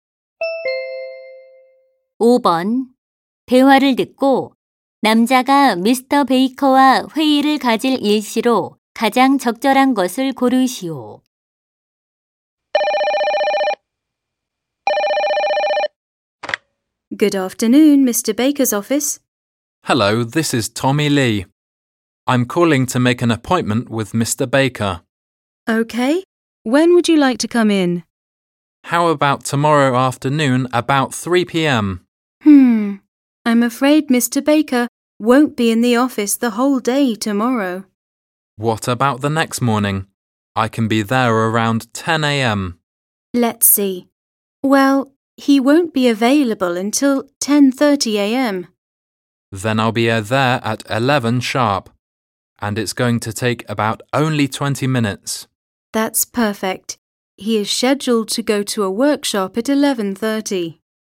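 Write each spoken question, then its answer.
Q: 대화를 듣고 남자가 미스터 베이커와 회의를 가질 일시로 가장 적절한 것을 고르시오.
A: 모레 오전 11시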